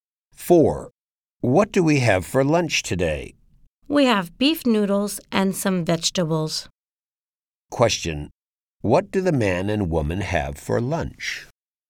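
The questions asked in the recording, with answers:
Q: What do the man and woman have for lunch?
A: Beef noodles and some vegetables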